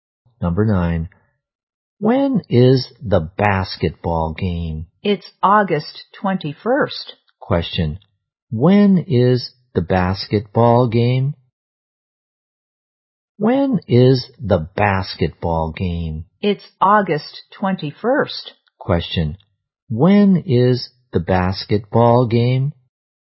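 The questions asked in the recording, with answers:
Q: when is the basketball game?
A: August 21st.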